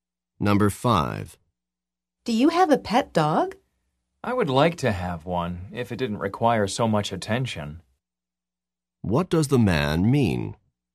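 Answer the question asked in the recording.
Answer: He has no dog because a dog needs too much attention.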